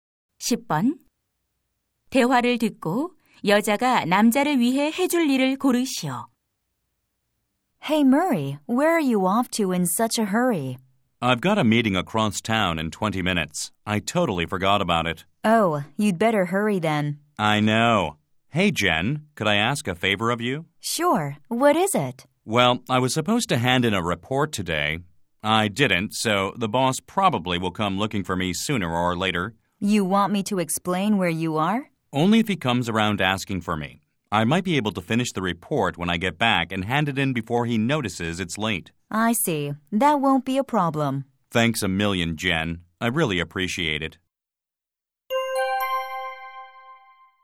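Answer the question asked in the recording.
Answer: 상사가 찾으면 남자가 어디 있는지 설명해 주기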